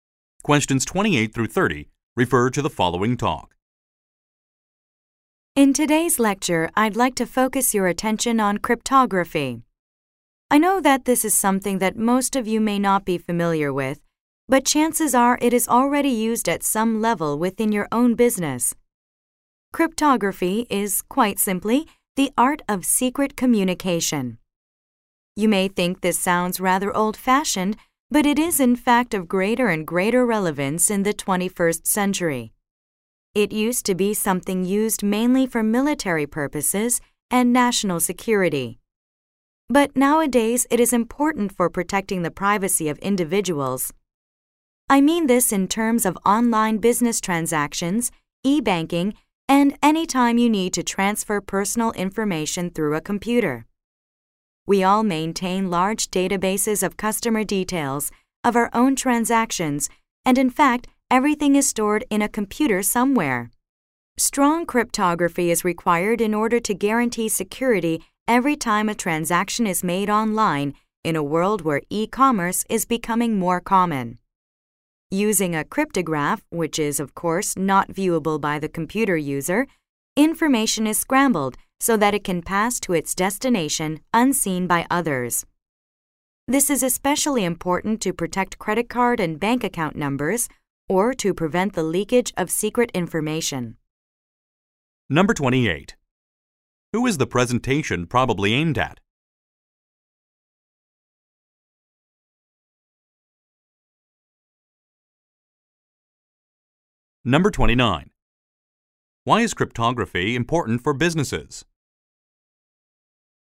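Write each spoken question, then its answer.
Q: Why is cryptography important for businesses?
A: It protects private information in online transactions.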